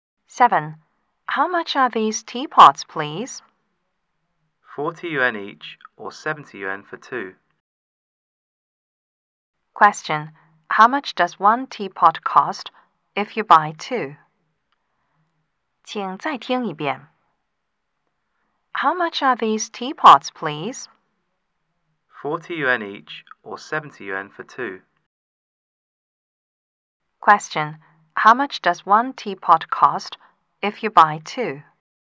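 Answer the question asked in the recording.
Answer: 35 yuan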